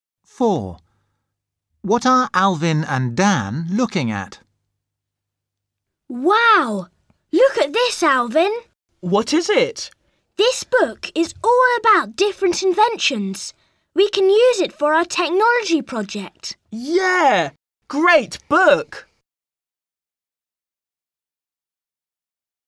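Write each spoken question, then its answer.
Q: What are Alvin and Dan looking at?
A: a book about inventions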